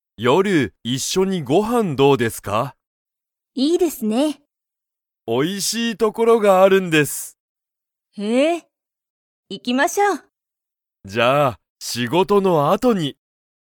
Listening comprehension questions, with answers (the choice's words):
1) 田中(たなか)さんと吉田(よしだ)さんは、____一緒(いっしょ)にご飯(はん)を食(た)べる。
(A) 先(さき)に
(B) 誰(だれ)も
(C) 最近(さいきん)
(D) 夜(よる)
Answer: 夜(よる)

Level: Level 1